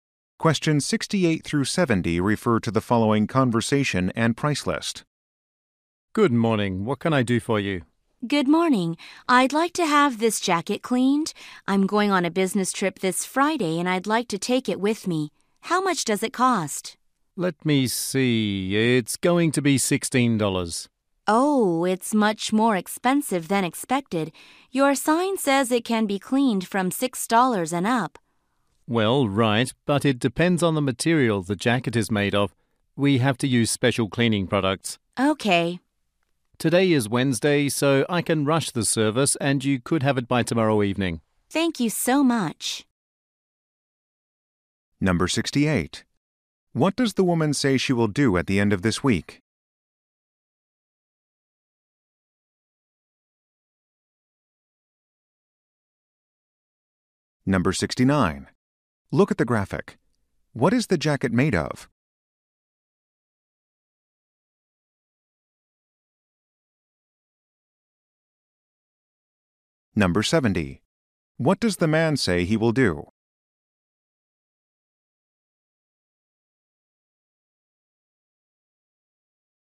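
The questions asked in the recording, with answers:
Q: What does the woman say she will do at the end of this week?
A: Go on a business trip

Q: What does the man say he will do?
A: Rush the cleaning so it is ready tomorrow evening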